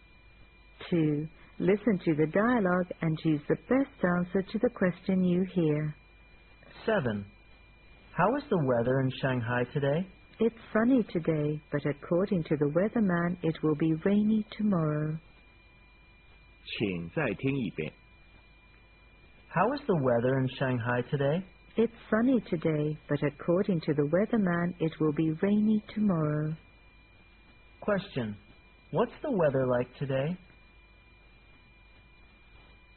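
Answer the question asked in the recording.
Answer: Sunny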